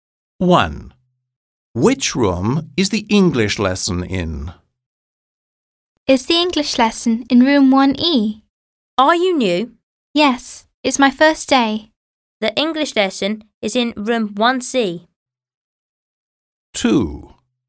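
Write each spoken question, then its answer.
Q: Which room is the English lesson in?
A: Room 1C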